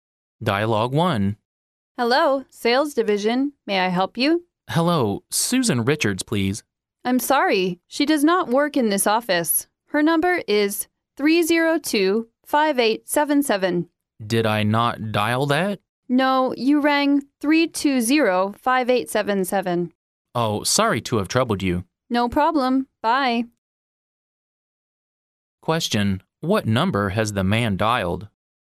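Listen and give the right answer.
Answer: 320-5877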